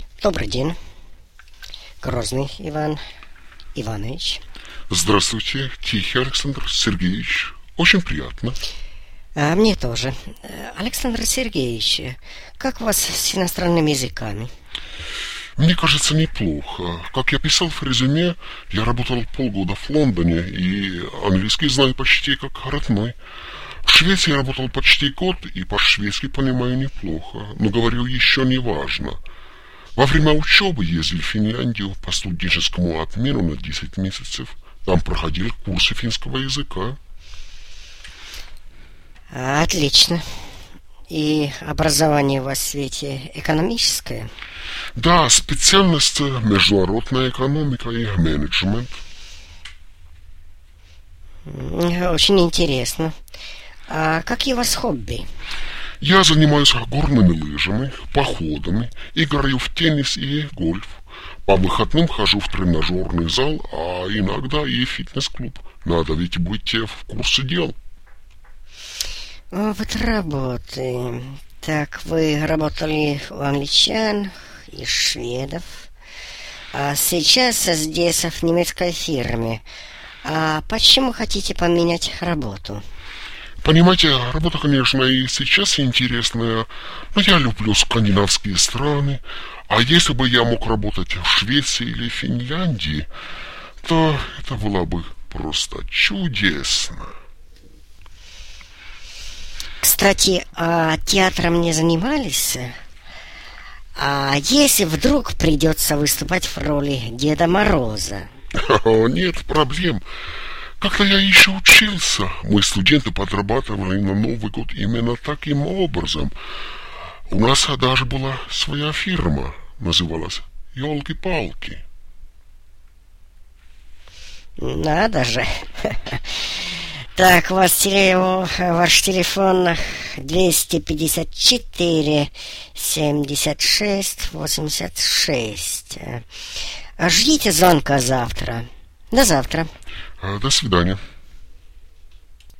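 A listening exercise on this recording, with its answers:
2. Интервью со вторым кандидатом.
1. Владение языками:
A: английский почти как родной, шведский понимает неплохо, курсы финского

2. Образование:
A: экономическое: международная экономика и менеджмент

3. Увлечения:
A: горные лыжи, походы, теннис, гольф, тренажёрный зал, фитнес

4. Опыт работы:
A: работал в Лондоне, в Швеции, сейчас в немецкой фирме

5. Номер телефона:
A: 254-76-86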